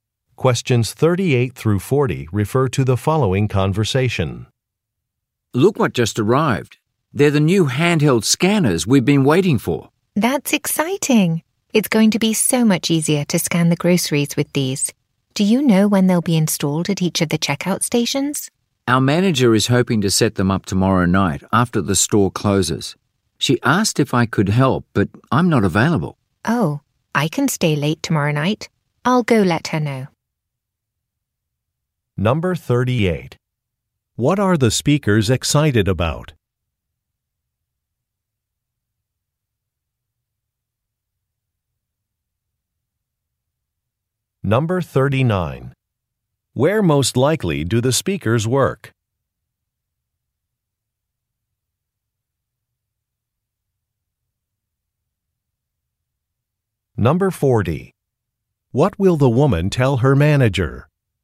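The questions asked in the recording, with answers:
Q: What are the speakers excited about?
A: New handheld scanners

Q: Where most likely do the speakers work?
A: At a grocery store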